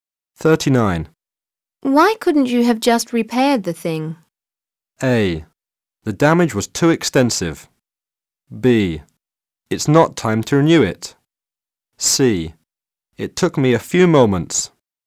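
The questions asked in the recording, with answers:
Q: Why couldn't you have just repaired the thing?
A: A: The damage was too extensive.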